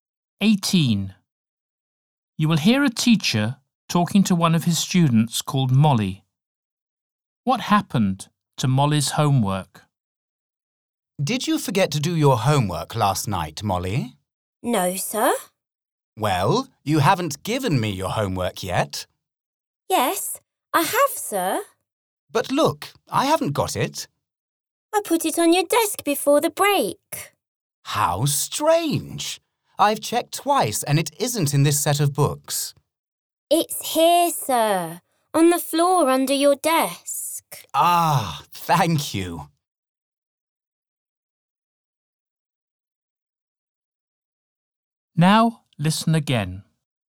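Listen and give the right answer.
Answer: It fell on the floor under the teacher's desk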